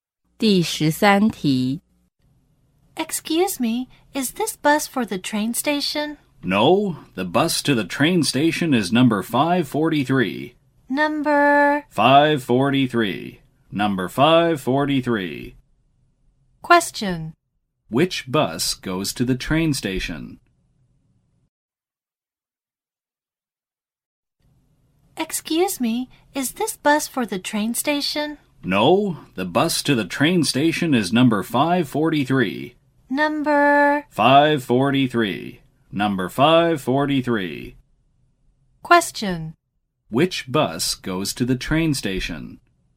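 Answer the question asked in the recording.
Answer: Number 543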